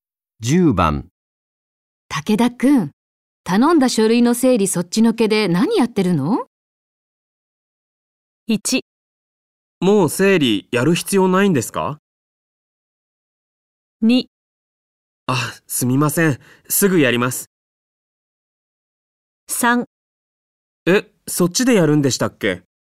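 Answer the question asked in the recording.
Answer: 2: あ、すみません。すぐやります。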